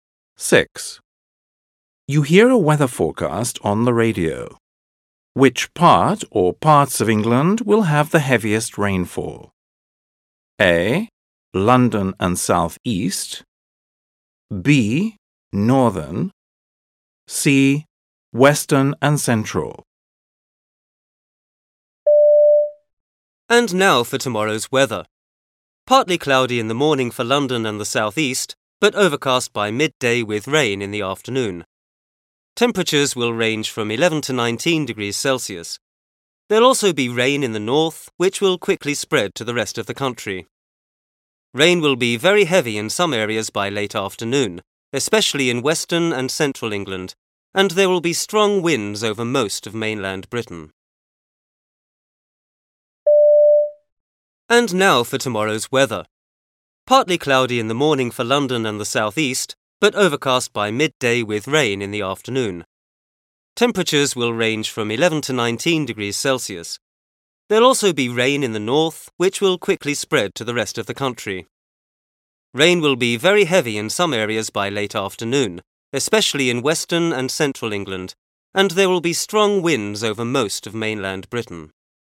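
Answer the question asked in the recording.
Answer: C: Western and Central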